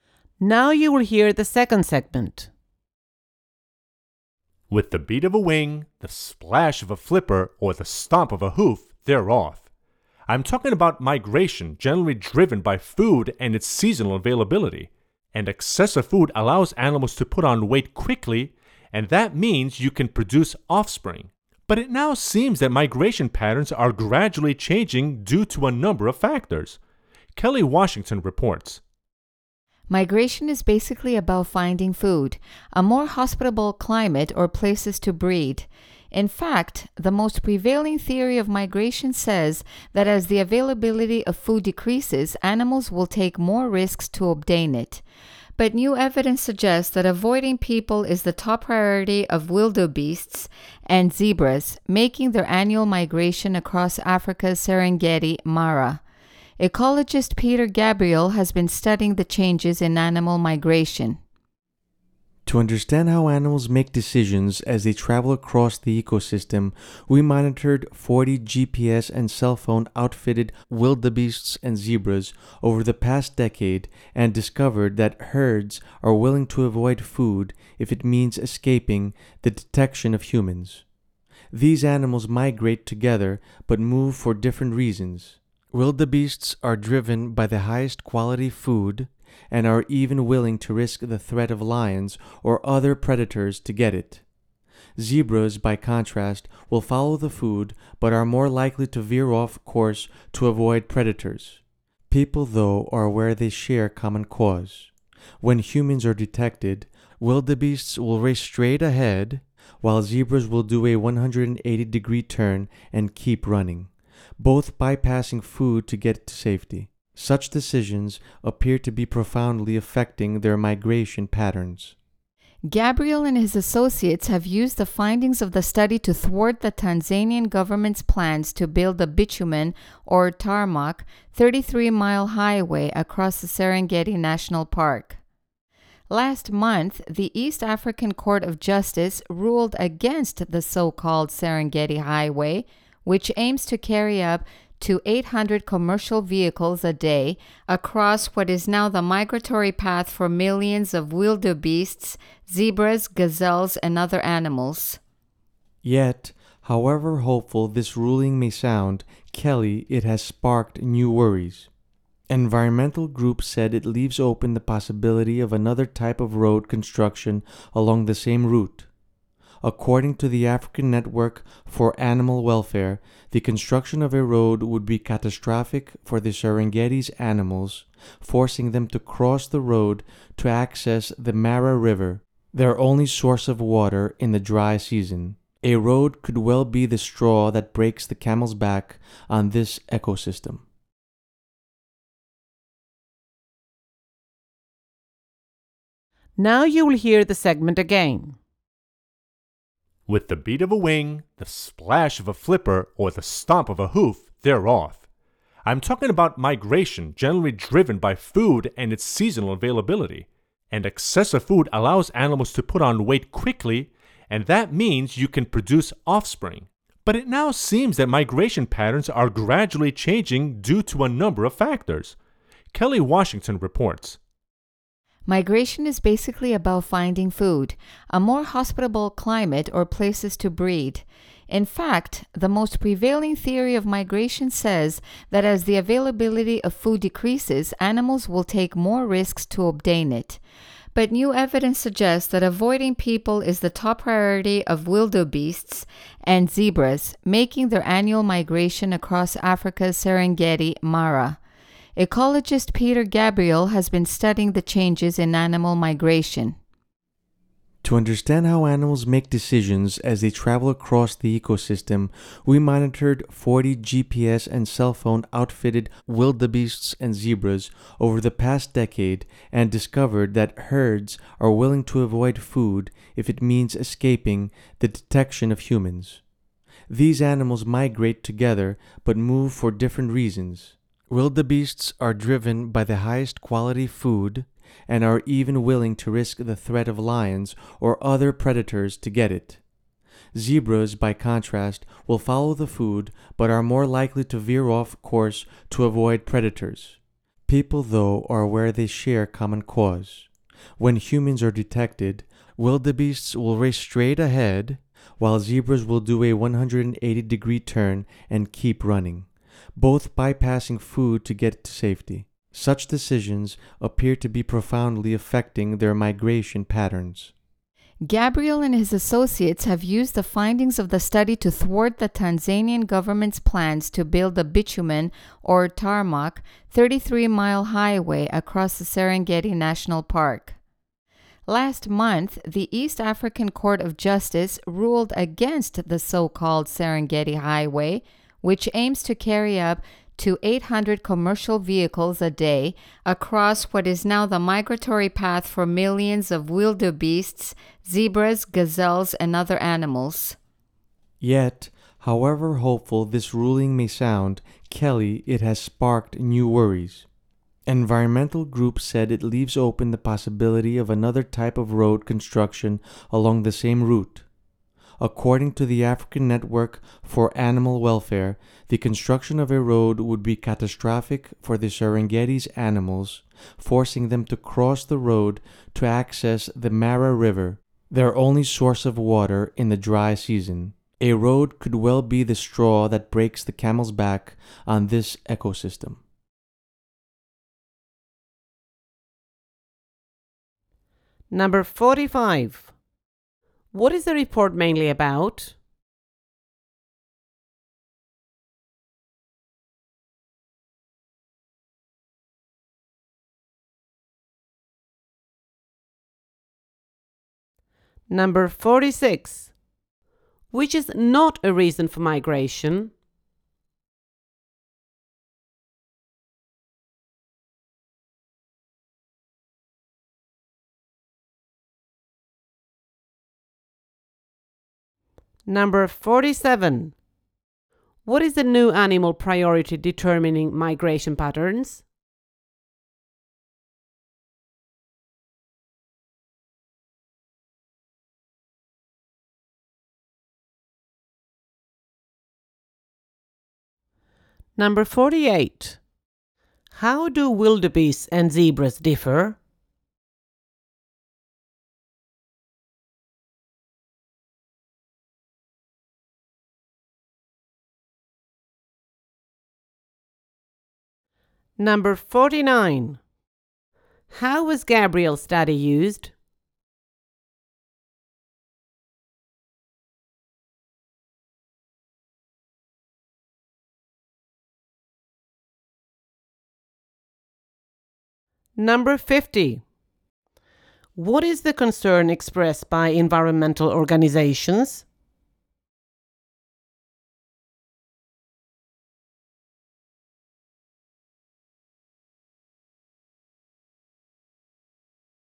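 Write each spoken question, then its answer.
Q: What is the report mainly about?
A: Changes in animal migration patterns

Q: What is the new animal priority determining migration patterns?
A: Avoiding people

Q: How do wildebeests and zebras differ?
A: Wildebeests risk predators for the best food; zebras veer off course to avoid predators

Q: How was Gabriel's study used?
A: To block plans for a highway across the Serengeti

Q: What is the concern expressed by environmental organizations?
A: Another type of road could still be built on the same route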